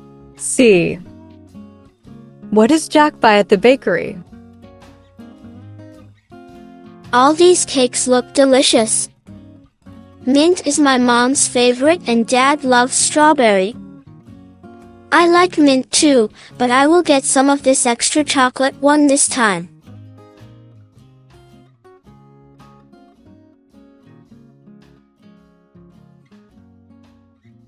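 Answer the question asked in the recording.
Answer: extra chocolate cake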